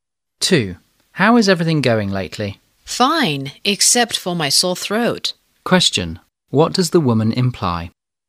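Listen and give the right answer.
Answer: She has a sore throat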